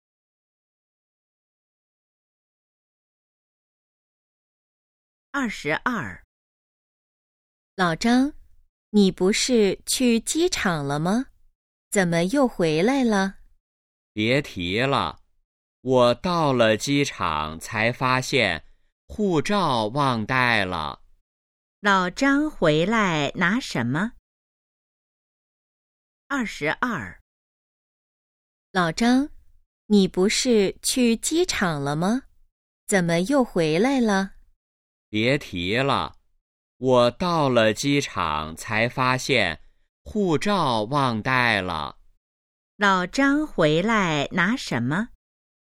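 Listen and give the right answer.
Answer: 护照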